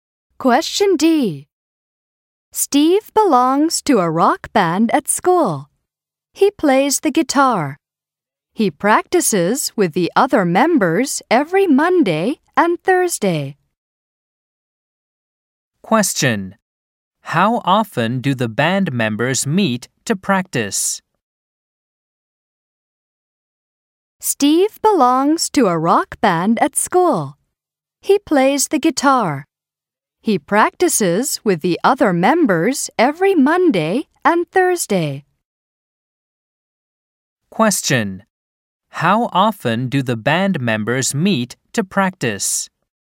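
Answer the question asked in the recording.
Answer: Twice a week (Mondays and Thursdays).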